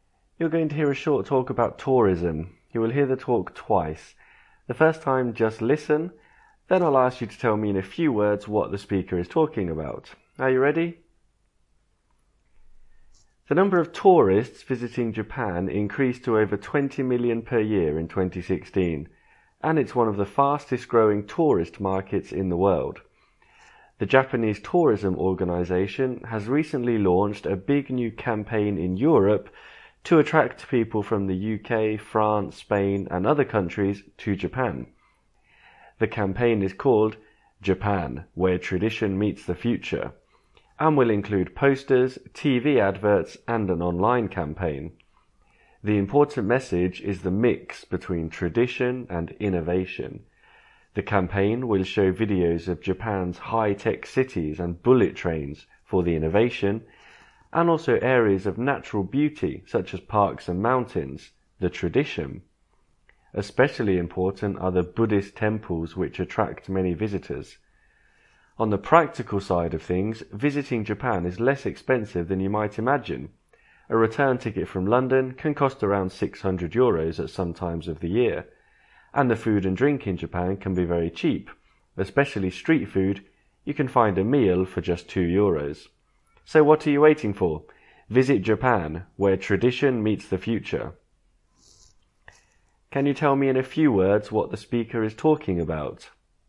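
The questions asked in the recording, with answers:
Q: Can you tell me in a few words what the speaker is talking about?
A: A campaign to attract European tourists to Japan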